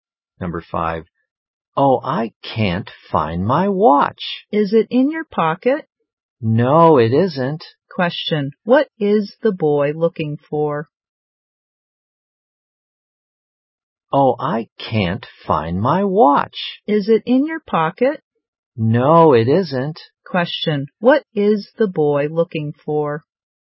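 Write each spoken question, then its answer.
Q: Question, what is the boy looking for?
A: His watch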